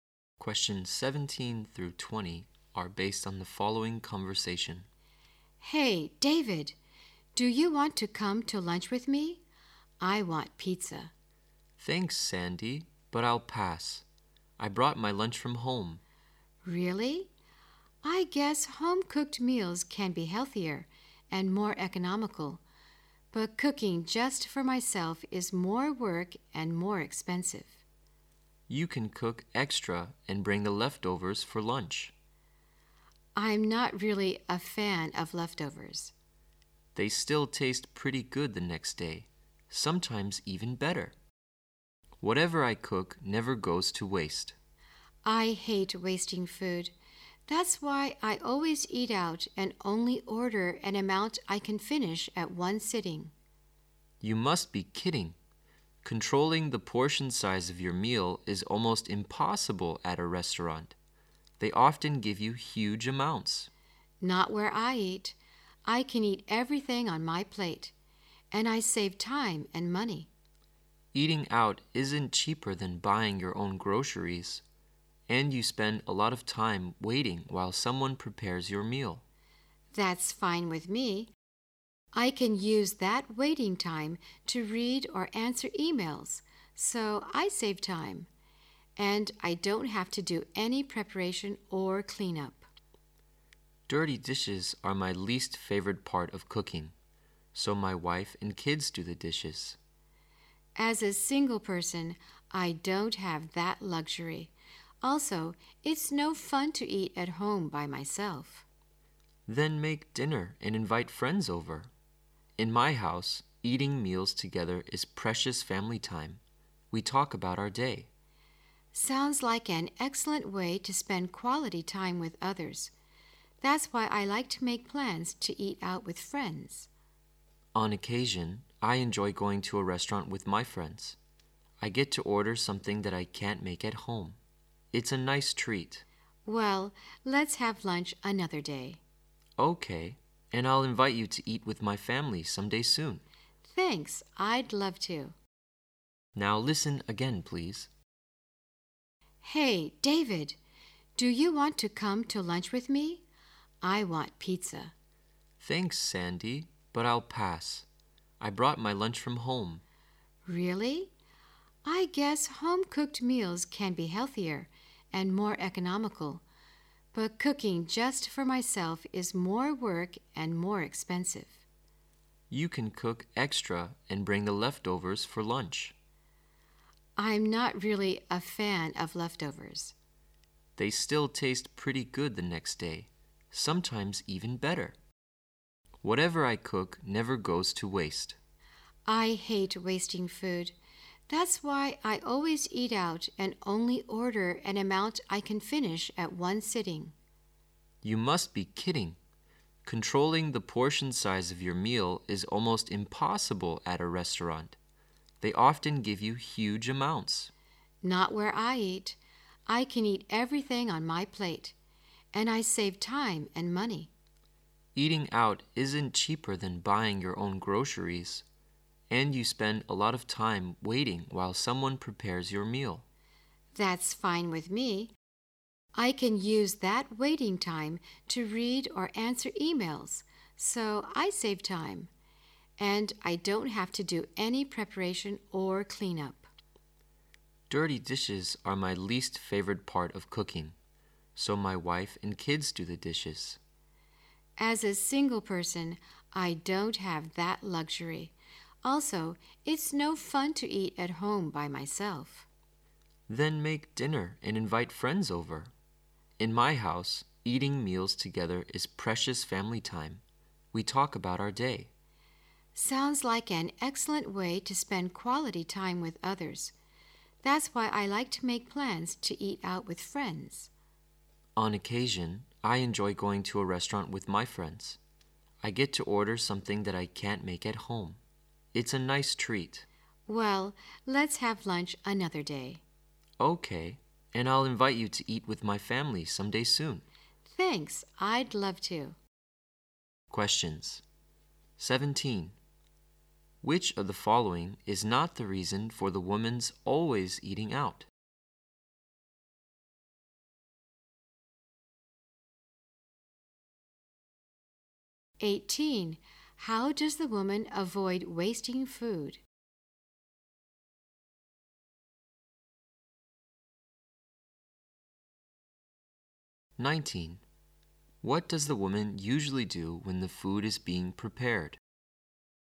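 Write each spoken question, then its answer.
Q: How does the woman avoid wasting food?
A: She orders only an amount she can finish at one sitting

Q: What does the woman usually do when the food is being prepared?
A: She reads or answers emails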